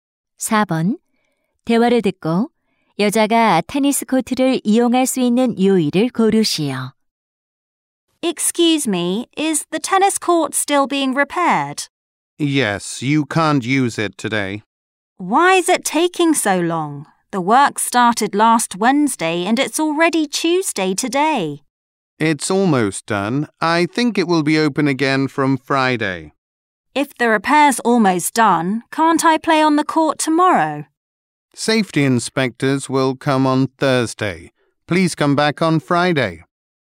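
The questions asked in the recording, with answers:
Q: 4번. 대화를 듣고 여자가 테니스 코트를 이용할 수 있는 요일을 고르시오.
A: 금요일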